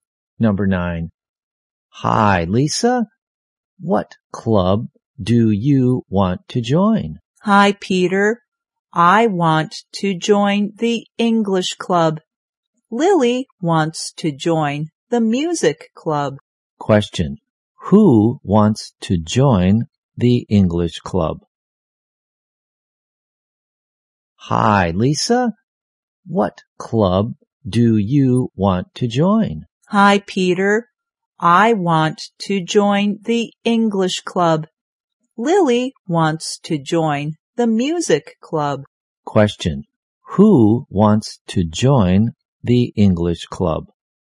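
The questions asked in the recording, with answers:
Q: Who wants to join the English club?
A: Lisa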